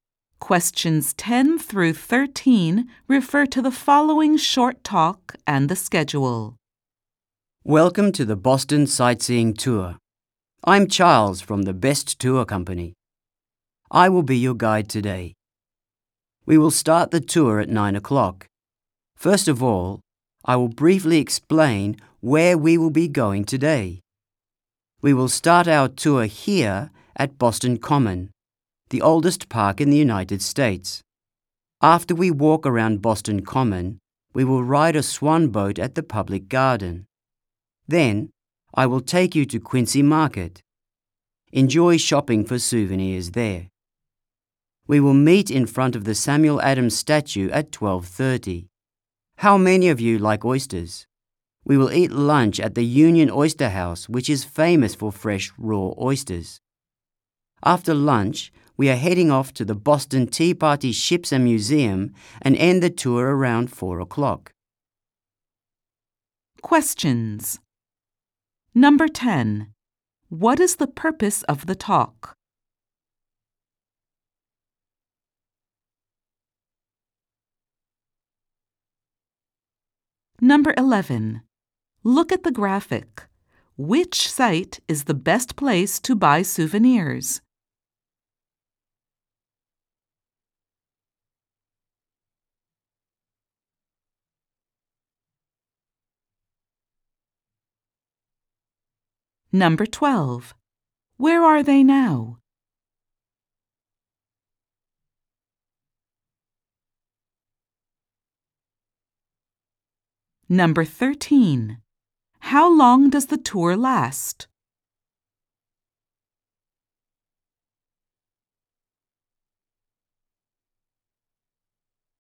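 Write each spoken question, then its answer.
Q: What is the purpose of the talk?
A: To introduce the guide and explain the day's tour schedule

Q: Where are they now?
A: At Boston Common

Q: How long does the tour last?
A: About seven hours (9 o'clock to around 4 o'clock)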